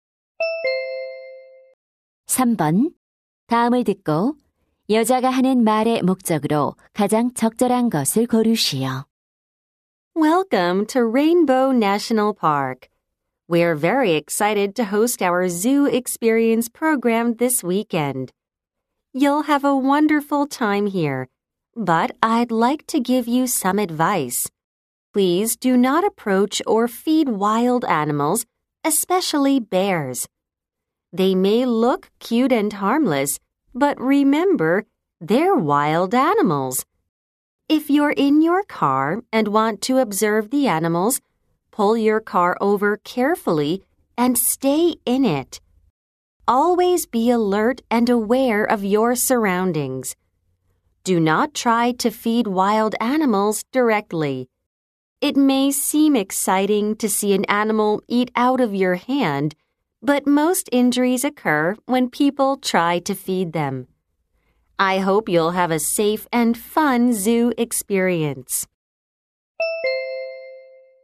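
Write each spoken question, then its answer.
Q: 다음을 듣고 여자가 하는 말의 목적으로 가장 적절한 것을 고르시오.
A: 야생동물 관람 시 안전 수칙을 안내하려고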